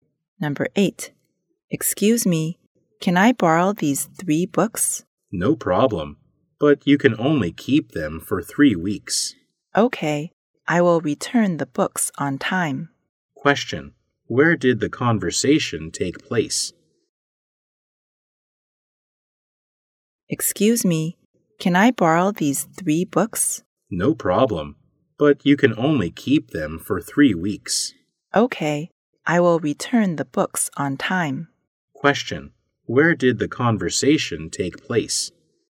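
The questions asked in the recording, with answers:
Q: Where did the conversation take place?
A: In a library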